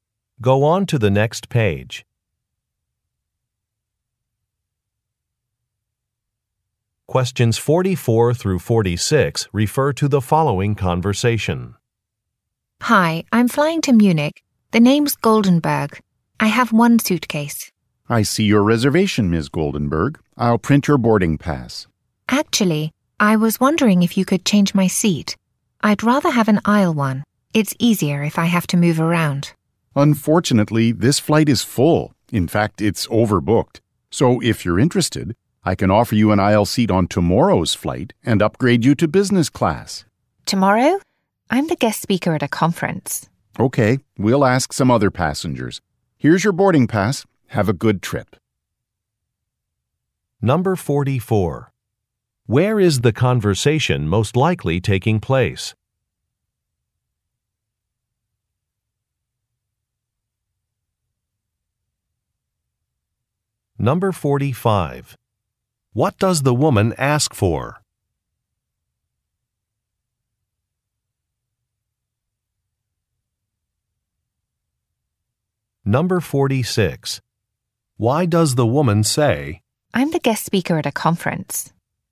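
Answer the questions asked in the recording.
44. At an airport
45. An aisle seat
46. She cannot take tomorrow's flight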